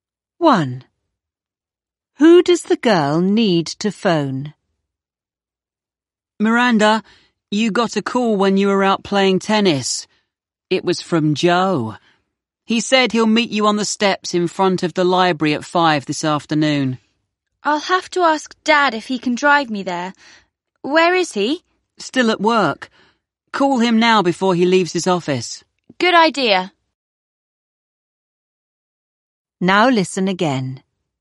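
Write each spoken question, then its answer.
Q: Who does the girl need to phone?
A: Her dad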